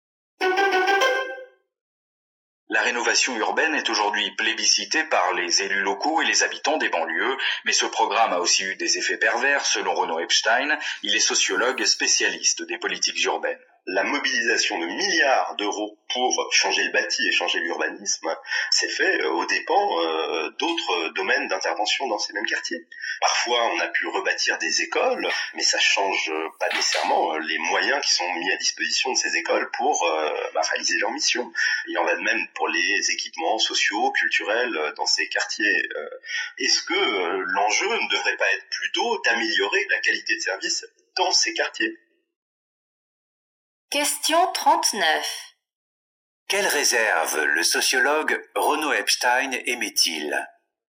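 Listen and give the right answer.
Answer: La rénovation urbaine s'est faite au détriment de la qualité des services dans ces quartiers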